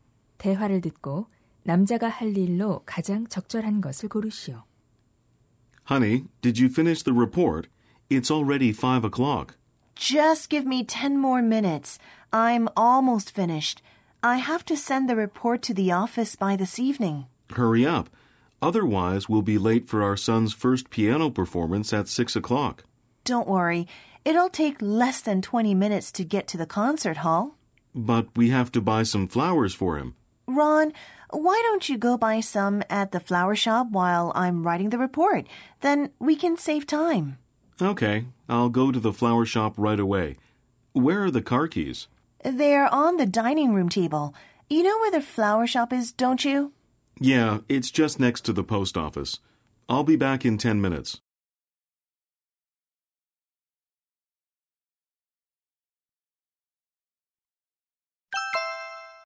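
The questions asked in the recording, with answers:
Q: 대화를 듣고 남자가 할 일로 가장 적절한 것을 고르시오.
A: 꽃 가게에 가서 꽃 사기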